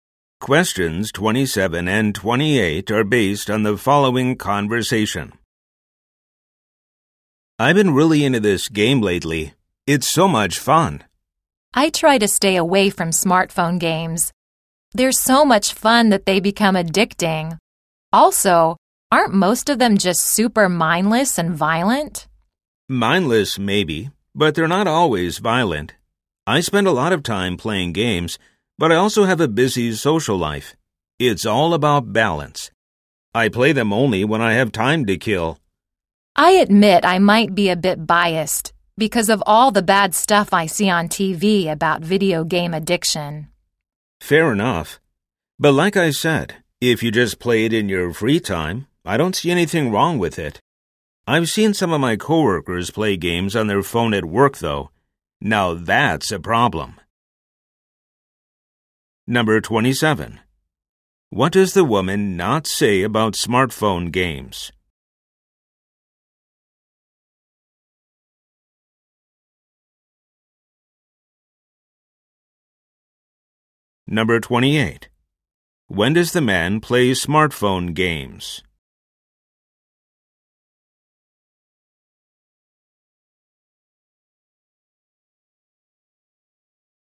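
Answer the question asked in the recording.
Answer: When he has time to kill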